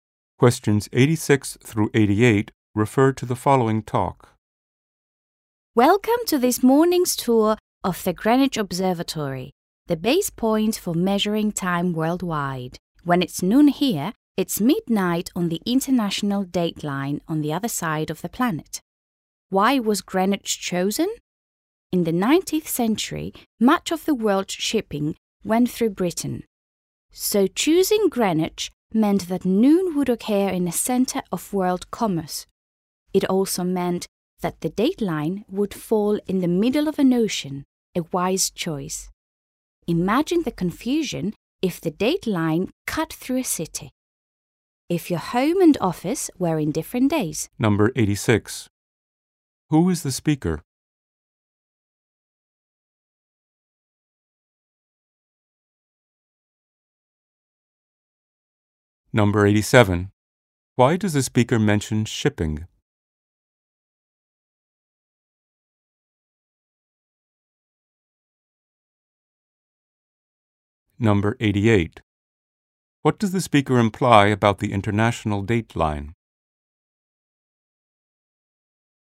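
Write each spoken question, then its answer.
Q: Who is the speaker?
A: A tour guide

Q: Why does the speaker mention shipping?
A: To explain why Greenwich was chosen

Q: What does the speaker imply about the international dateline?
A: Its ocean location avoids confusion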